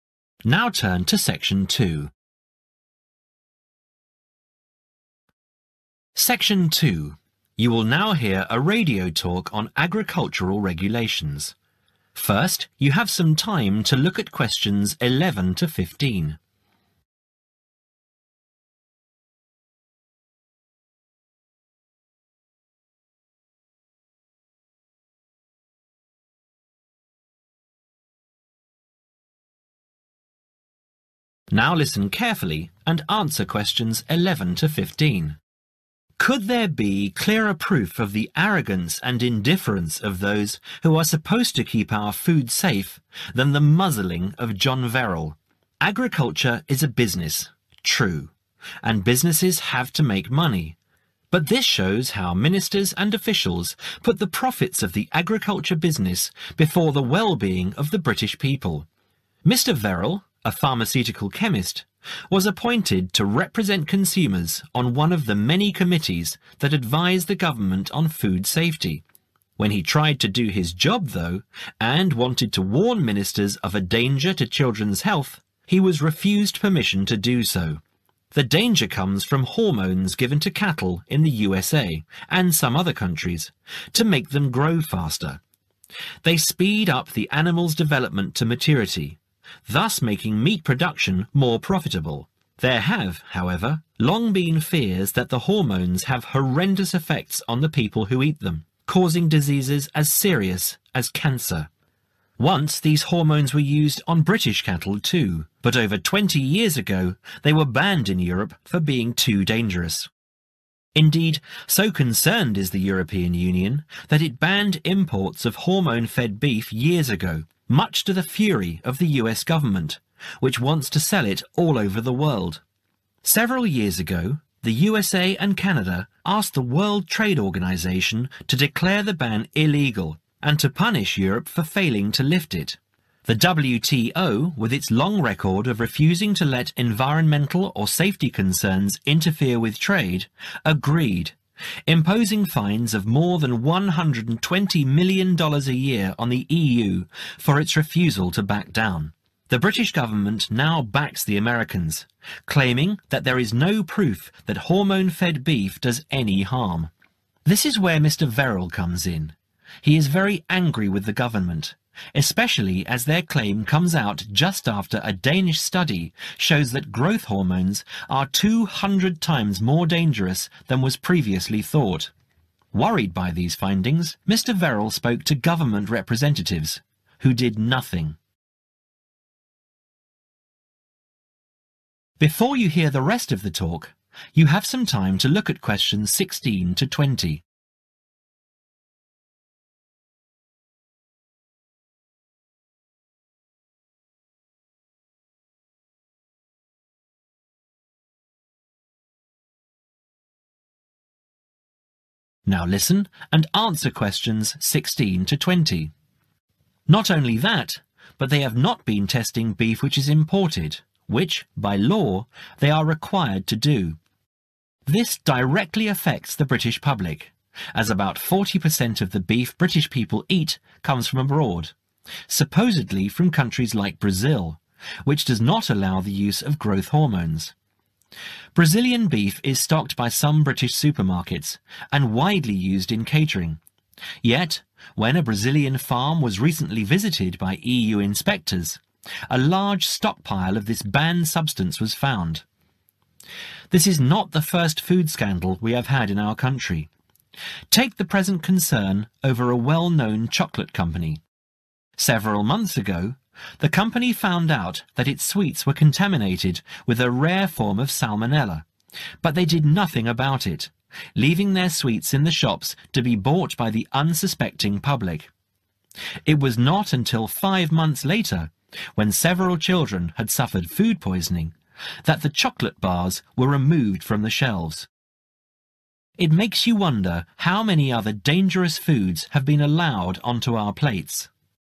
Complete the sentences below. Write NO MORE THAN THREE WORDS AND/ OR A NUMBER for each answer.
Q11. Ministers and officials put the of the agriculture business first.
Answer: profits

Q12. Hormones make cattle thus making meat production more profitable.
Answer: grow faster

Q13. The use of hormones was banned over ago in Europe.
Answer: 20 years

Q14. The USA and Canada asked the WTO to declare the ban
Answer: illegal

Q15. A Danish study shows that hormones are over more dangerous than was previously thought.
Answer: 200 times

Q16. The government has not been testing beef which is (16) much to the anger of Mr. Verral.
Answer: imported

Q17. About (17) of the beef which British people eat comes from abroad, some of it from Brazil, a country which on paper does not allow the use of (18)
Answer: 40%

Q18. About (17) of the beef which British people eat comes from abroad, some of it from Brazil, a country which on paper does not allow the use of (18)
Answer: (growth) hormones

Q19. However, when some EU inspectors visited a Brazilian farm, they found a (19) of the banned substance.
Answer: large stockpile

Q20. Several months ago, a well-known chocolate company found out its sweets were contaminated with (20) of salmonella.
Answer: a rare form